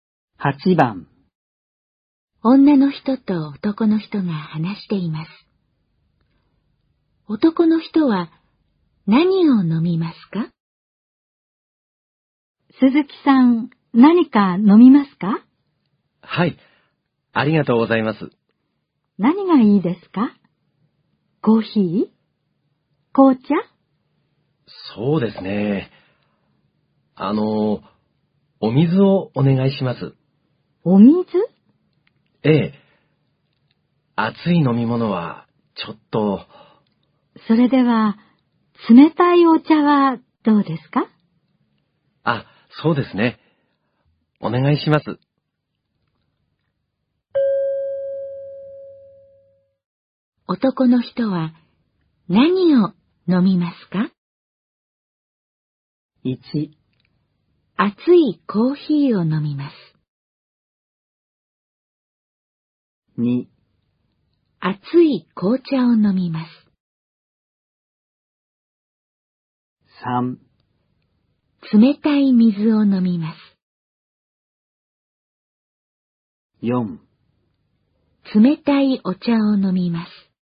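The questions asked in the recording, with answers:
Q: 男の人は、何を飲みますか?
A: 4: 冷たいお茶を飲みます。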